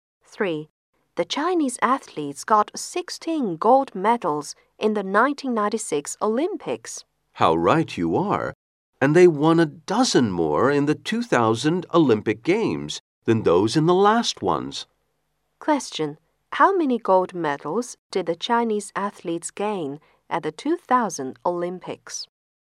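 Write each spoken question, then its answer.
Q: How many gold medals did the Chinese athletes gain at the 2000 Olympics?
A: 28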